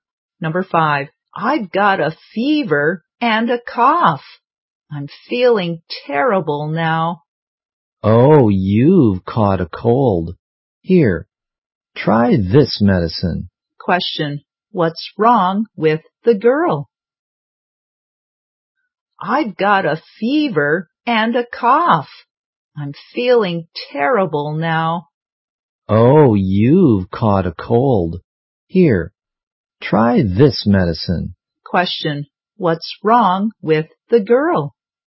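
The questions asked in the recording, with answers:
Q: what's wrong with the girl?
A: She has caught a cold (fever and cough)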